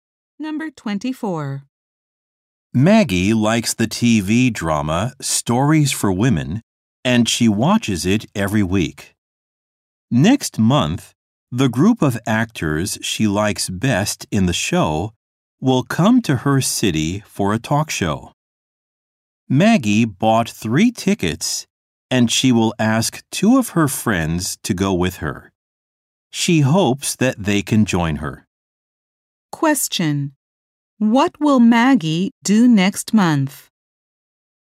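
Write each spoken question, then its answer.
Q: Question.What will Maggie do next month?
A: Go to a talk show with her friends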